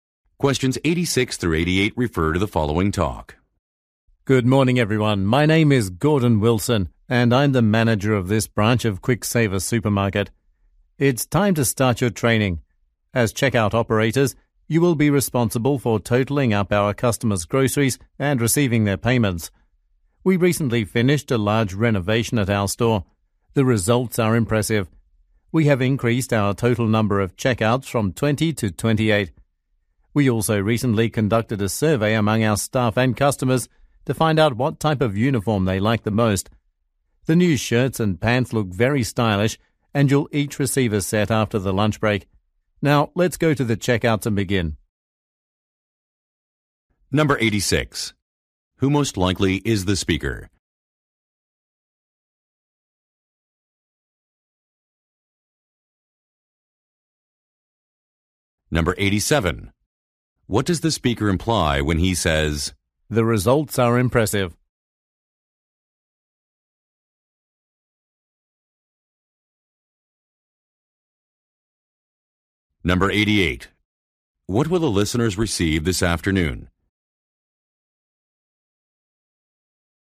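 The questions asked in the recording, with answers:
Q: Who most likely is the speaker?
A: A supermarket manager

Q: What will the listeners receive this afternoon?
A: New uniforms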